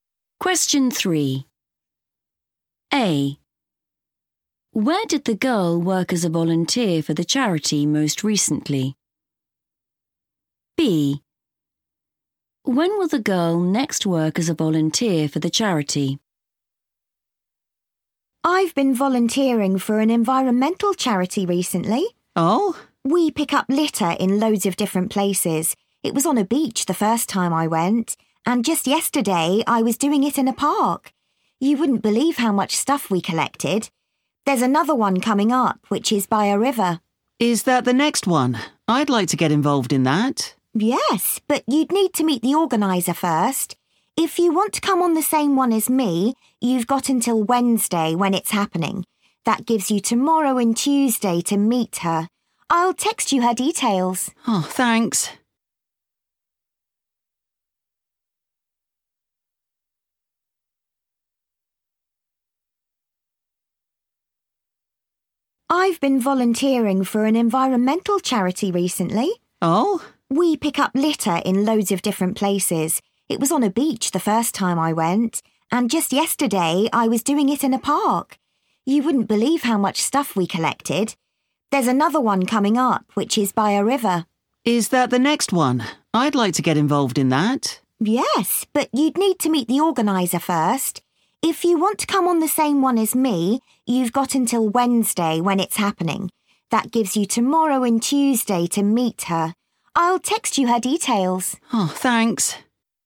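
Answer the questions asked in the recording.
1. in a park
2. Wednesday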